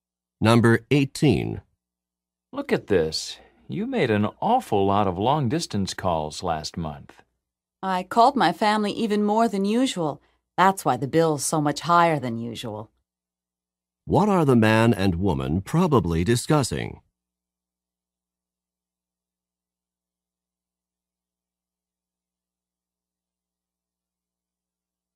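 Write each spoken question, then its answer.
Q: What are the man and woman probably discussing?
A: The phone bill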